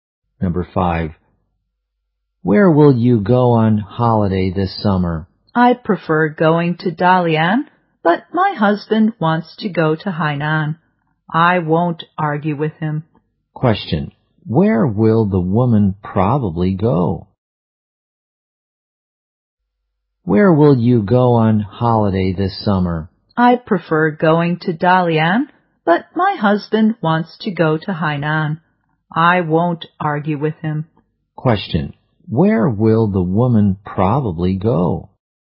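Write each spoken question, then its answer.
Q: where will the woman probably go?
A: Hainan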